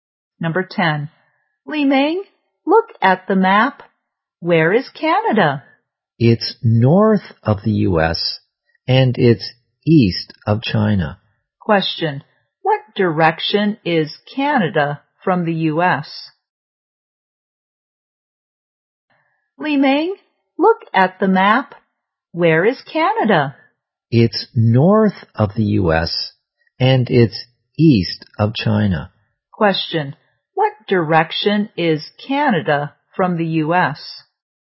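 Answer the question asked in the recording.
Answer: North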